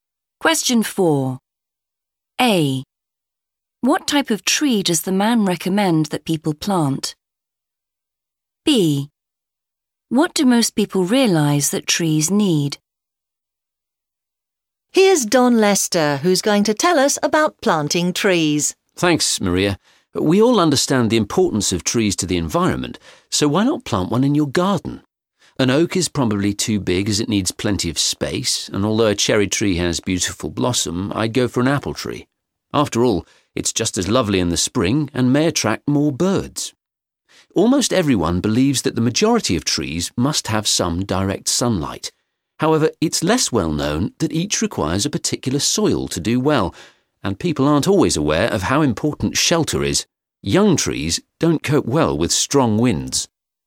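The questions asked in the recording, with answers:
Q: What type of tree does the man recommend that people plant?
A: an apple tree

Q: What do most people realise that trees need?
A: direct sunlight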